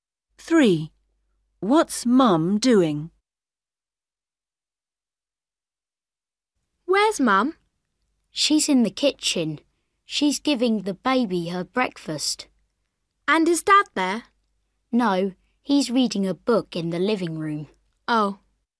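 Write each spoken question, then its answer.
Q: What's Mum doing?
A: giving the baby her breakfast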